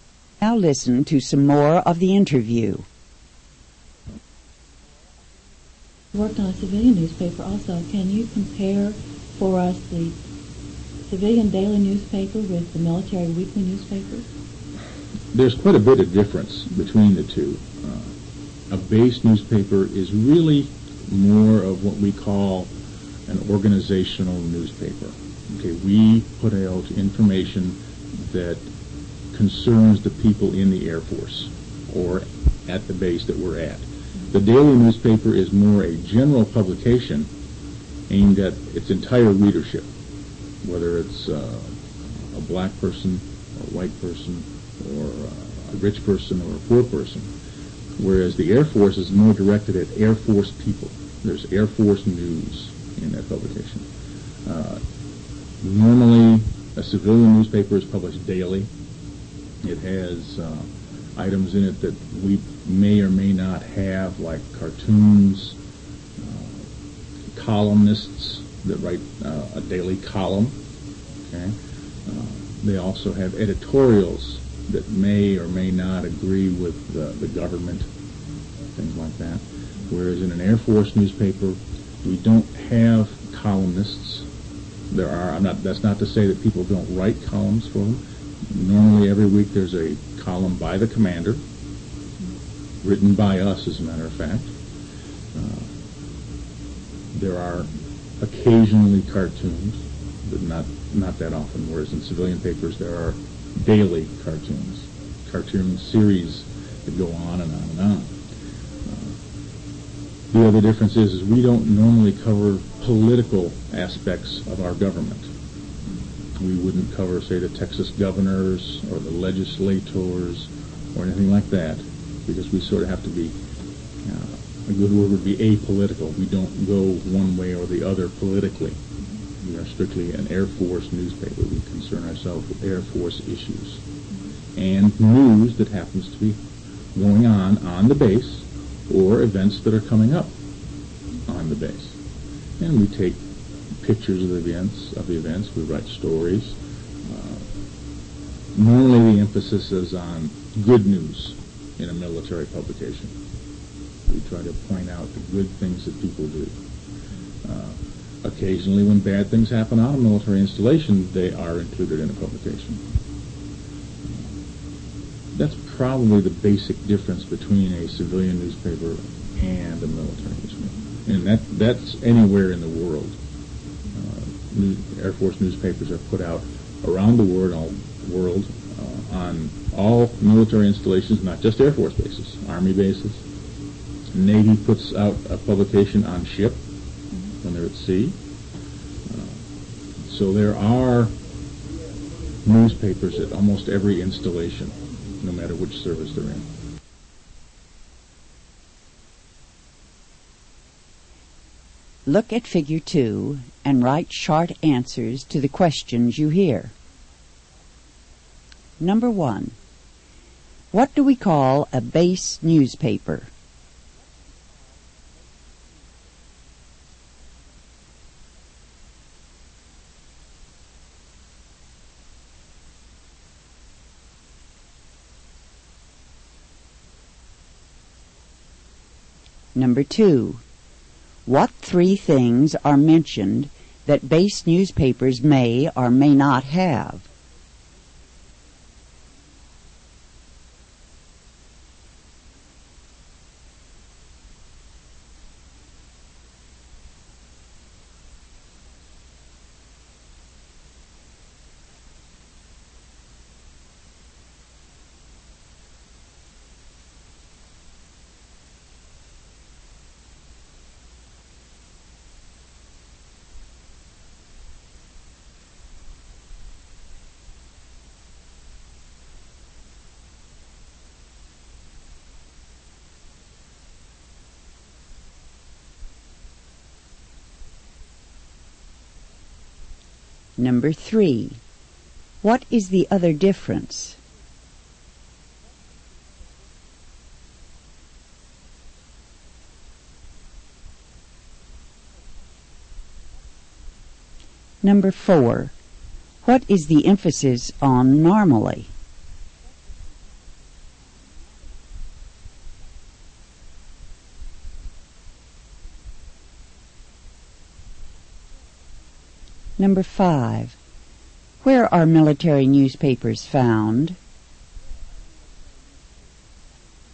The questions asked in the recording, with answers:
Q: What do we call a base newspaper?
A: The answer is an organizational newspaper.

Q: What 3 things are mentioned that base newspapers may or may not have?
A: The answer is cartoons, columnists that write a daily column, and editorials that may or may not agree with the government.

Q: What is the other difference?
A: The answer is political aspects.

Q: What is the emphasis on normally?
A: The answer is good news, the good things people do.

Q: Where are military newspapers found?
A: The answer is at almost every military installation.